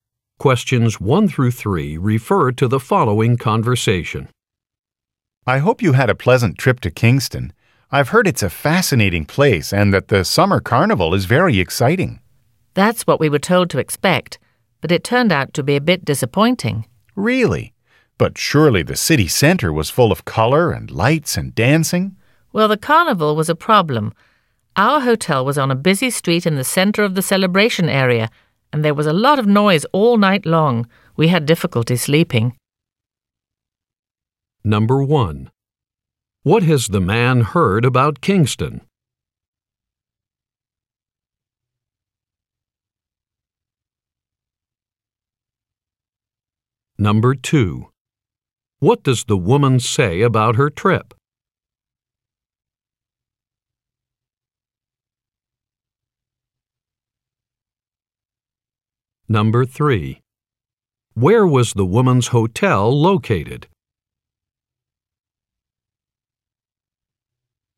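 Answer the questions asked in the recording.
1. It is fascinating and its summer carnival is very exciting
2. It was a bit disappointing
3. On a busy street in the center of the celebration area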